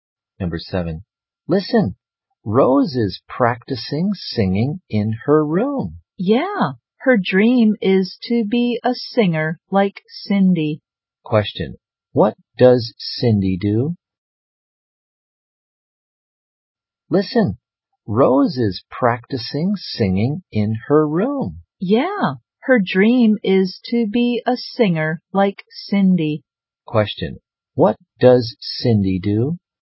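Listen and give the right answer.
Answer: She is a singer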